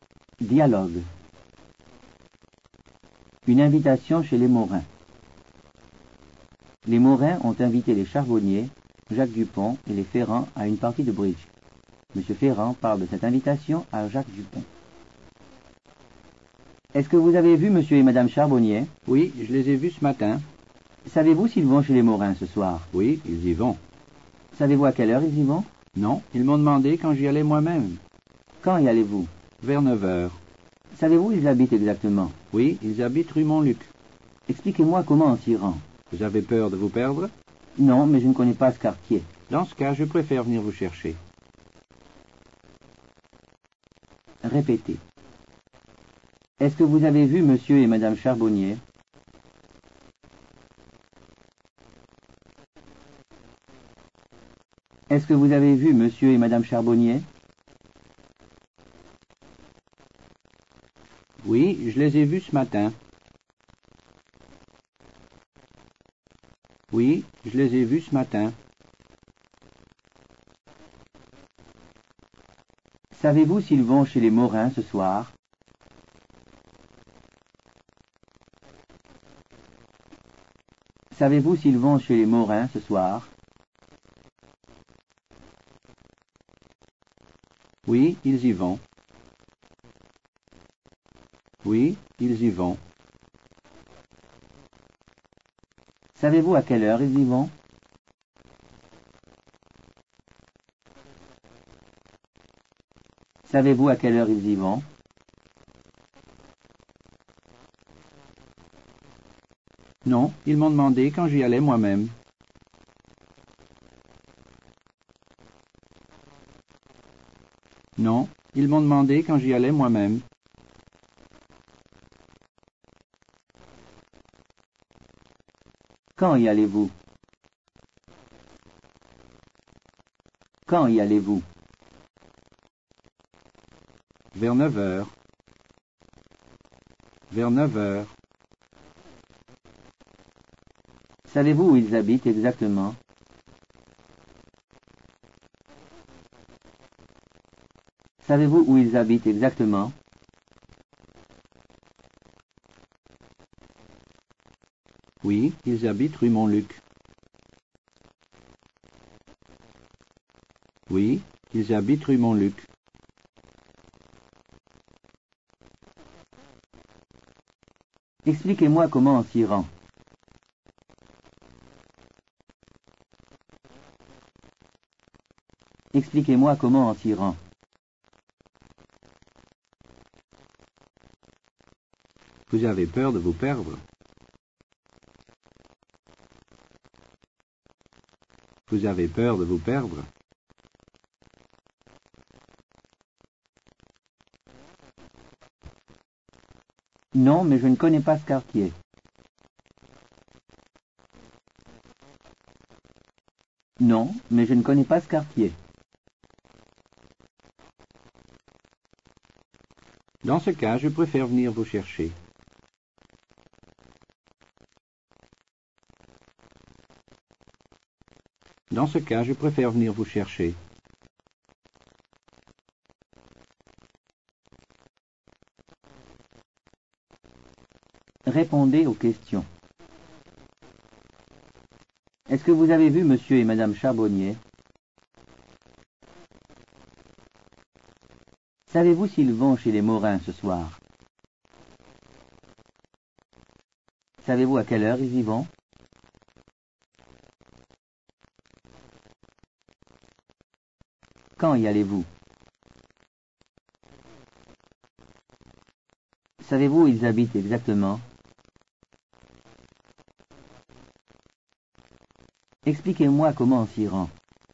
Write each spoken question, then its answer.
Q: Est-ce que vous avez vu Monsieur et Madame Charbonnier?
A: Oui, je les ai vus ce matin.

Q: Savez-vous s'ils vont chez les Morin ce soir?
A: Oui, ils y vont.

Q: Savez-vous à quelle heure ils y vont?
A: Non, ils m'ont demandé quand j'y allais moi-même.

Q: Quand y allez-vous?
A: Vers 9 heures.

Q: Savez-vous où ils habitent exactement?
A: Oui, ils habitent rue Montluc.